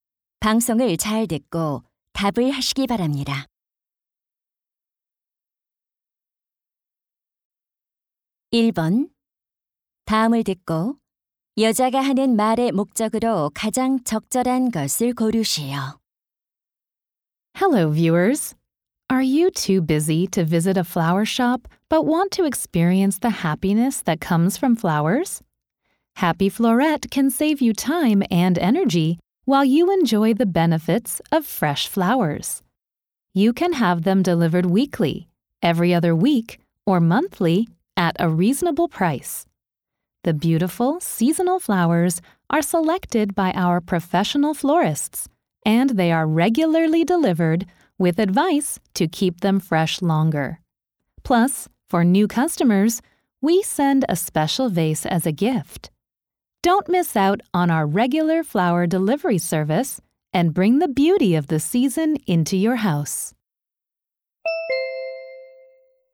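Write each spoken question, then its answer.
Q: 다음을 듣고 여자가 하는 말의 목적으로 가장 적절한 것을 고르시오.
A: 정기 꽃 배달 서비스를 홍보하려고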